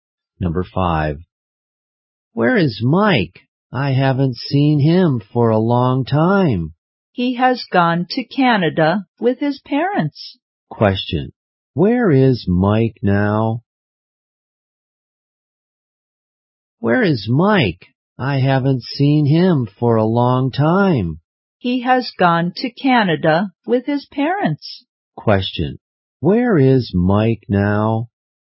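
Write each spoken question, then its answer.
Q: Question, where is Mike now?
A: In Canada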